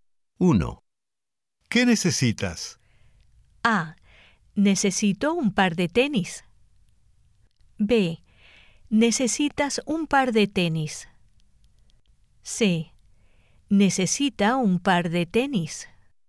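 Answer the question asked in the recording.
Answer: A: Necesito un par de tenis.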